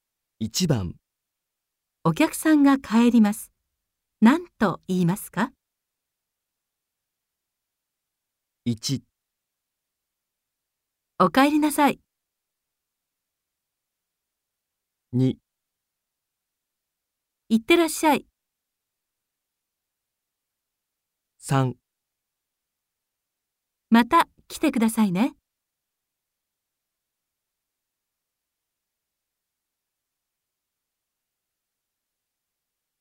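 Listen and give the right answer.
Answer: 3: また来てくださいね。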